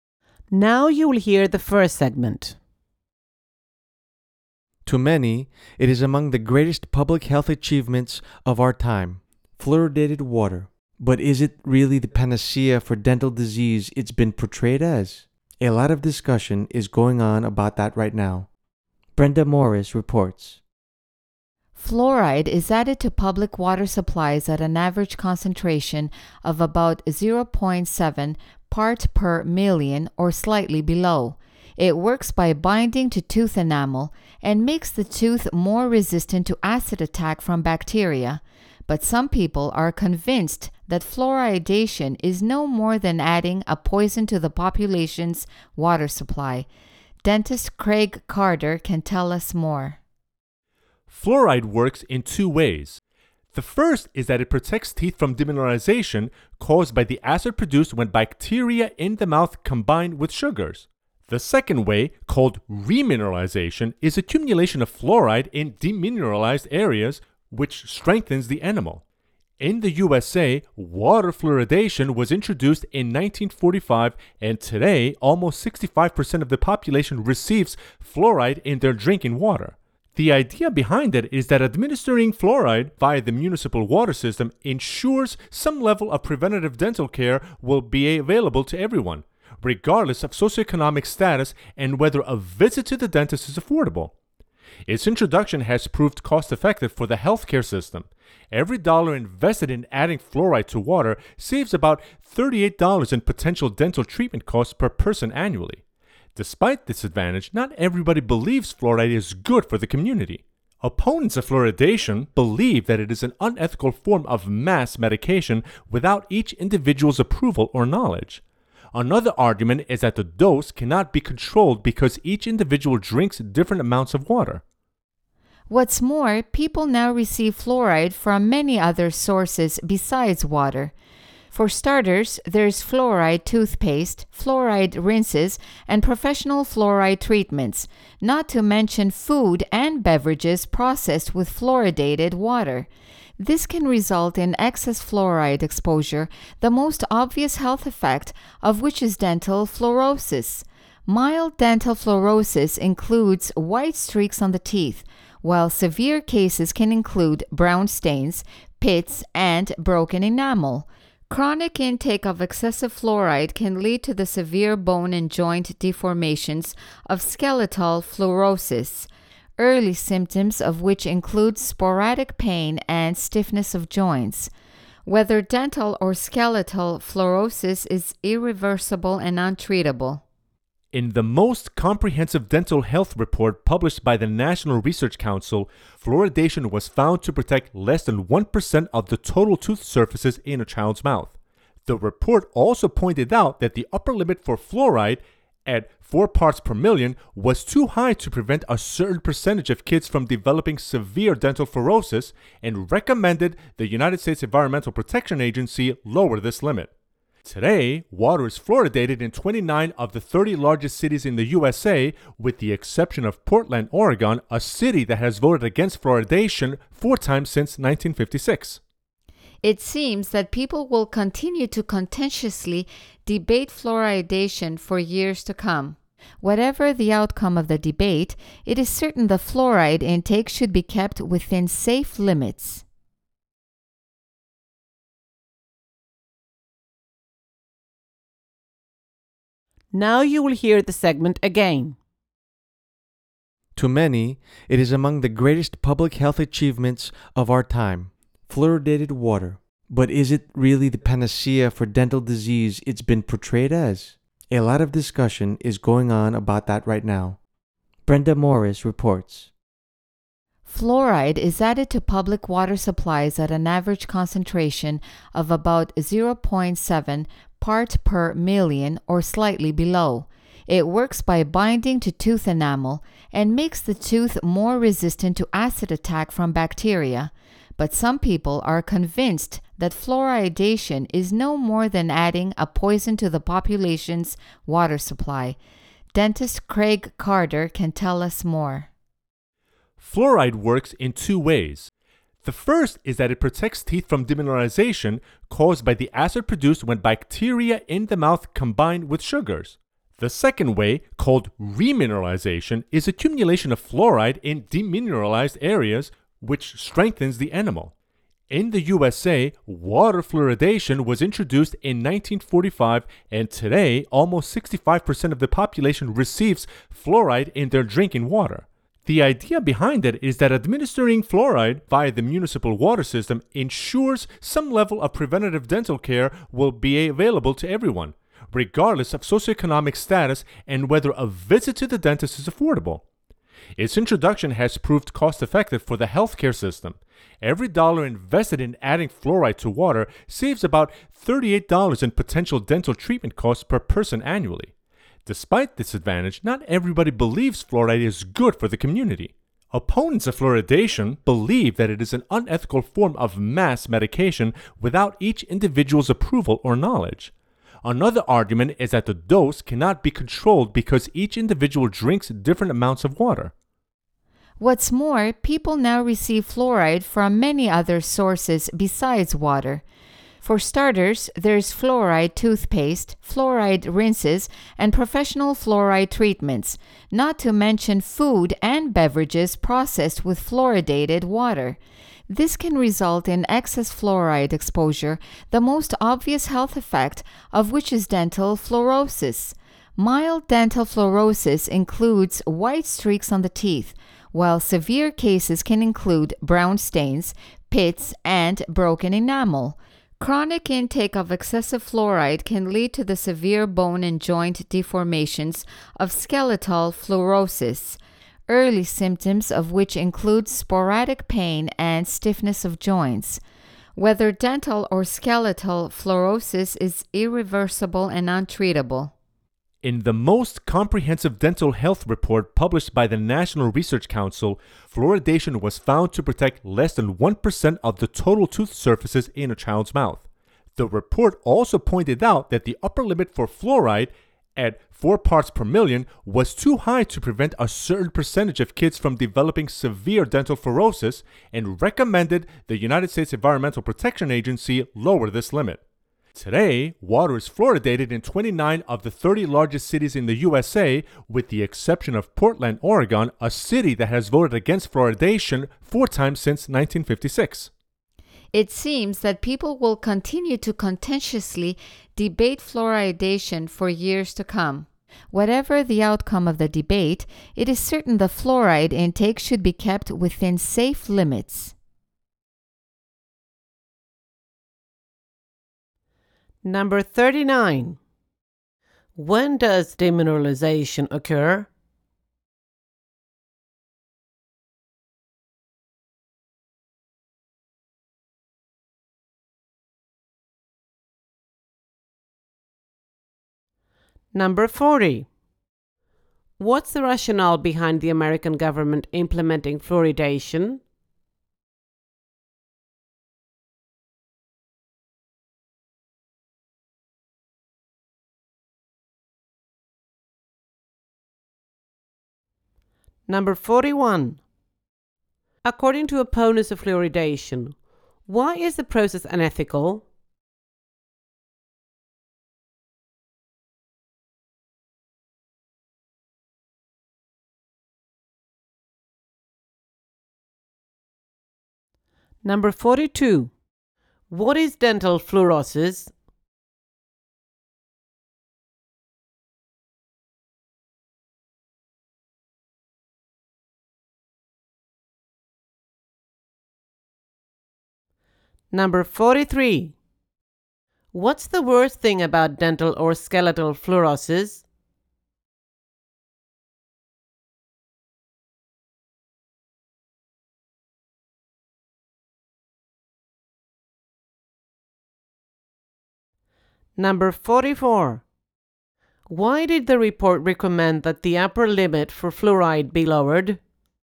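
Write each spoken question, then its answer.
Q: When does demineralization occur?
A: When bacteria in the mouth combine with sugars and produce acid

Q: What's the rationale behind the American government implementing fluoridation?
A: To make some preventive dental care available to everyone, whatever their income

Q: According to opponents of fluoridation, why is the process unethical?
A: It is mass medication without each individual's approval or knowledge

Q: What is dental fluorosis?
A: A health effect of too much fluoride that causes white streaks or brown stains, pits and broken enamel on teeth

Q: What's the worst thing about dental or skeletal fluorosis?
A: It cannot be reversed or treated

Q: Why did the report recommend that the upper limit for fluoride be lowered?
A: The 4 ppm limit was too high to keep some children from developing severe dental fluorosis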